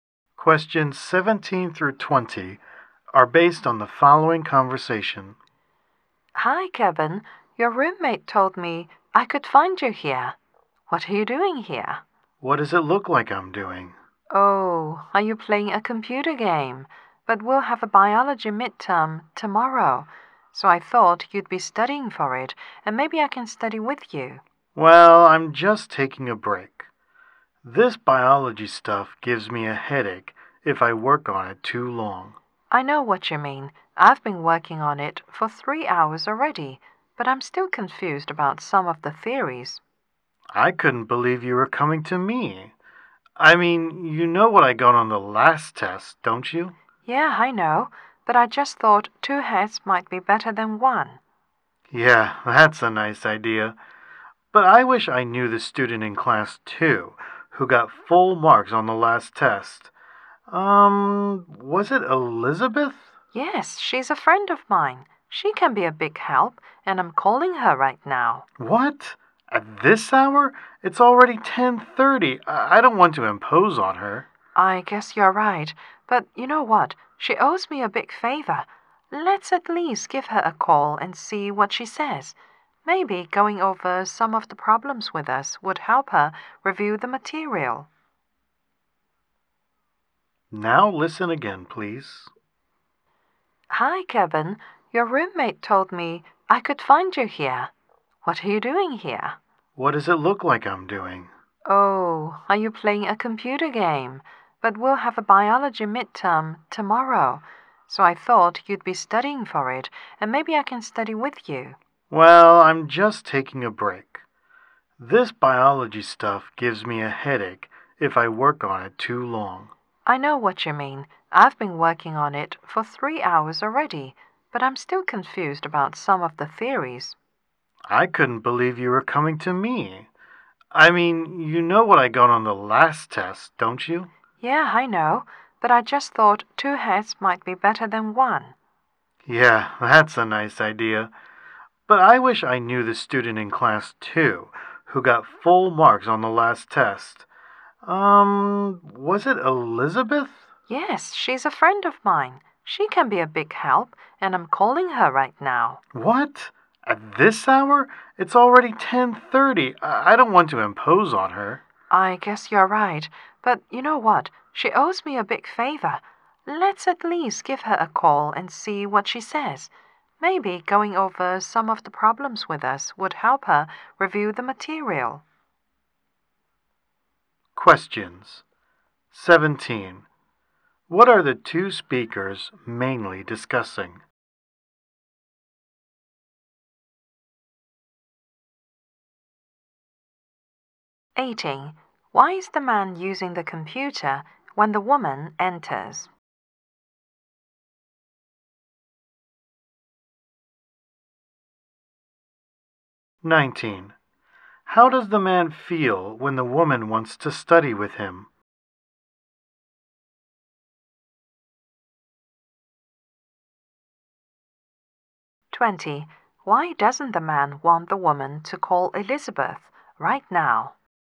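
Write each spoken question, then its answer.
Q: Why is the man using the computer when the woman enters?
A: He is taking a break from studying biology

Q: Why doesn't the man want the woman to call Elizabeth right now?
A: It is already 10:30 and he doesn't want to impose on her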